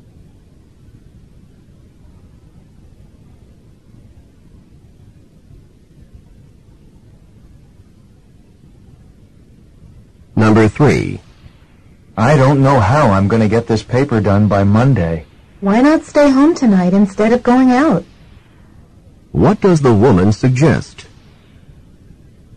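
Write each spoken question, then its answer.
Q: What does the woman suggest?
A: Stay home tonight to work on the paper.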